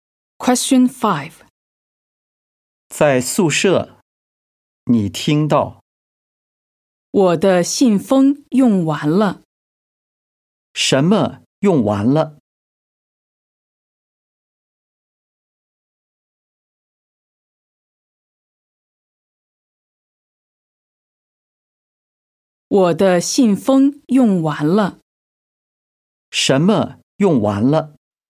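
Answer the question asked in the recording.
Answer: 信封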